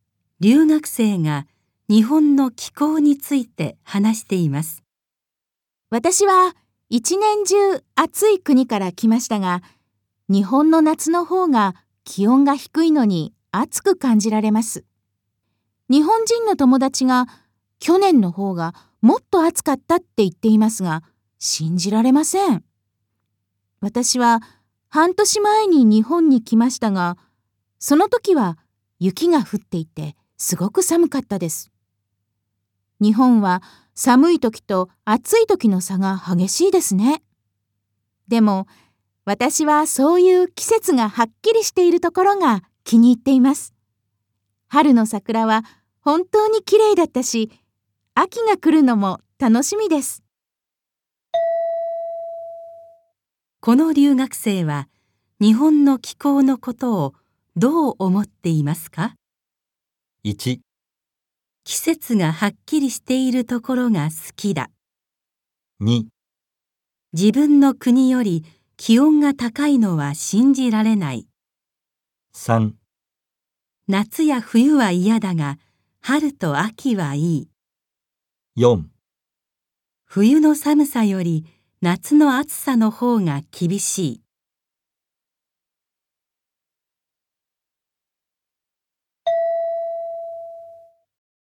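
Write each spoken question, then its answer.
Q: この留学生は日本の気候のことをどう思っていますか?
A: 1: 季節がはっきりしているところが好きだ。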